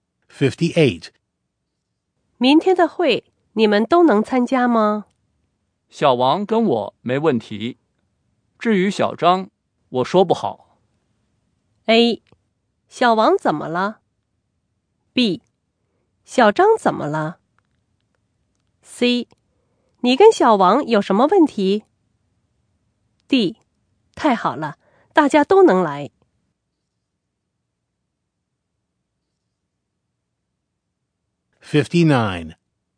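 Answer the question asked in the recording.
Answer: B: 小张怎么了?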